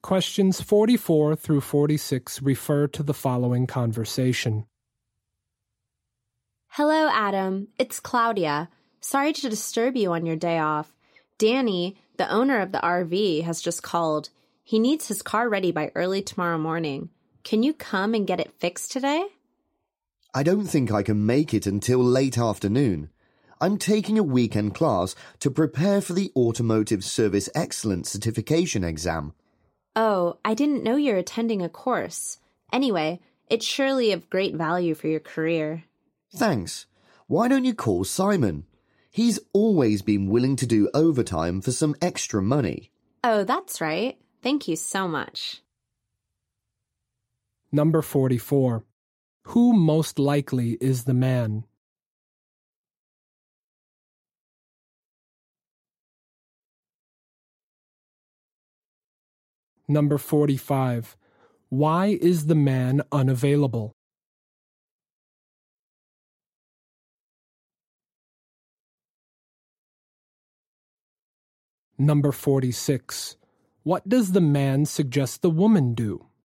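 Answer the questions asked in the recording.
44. A car mechanic
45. He is taking a weekend class to prepare for a certification exam
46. Call Simon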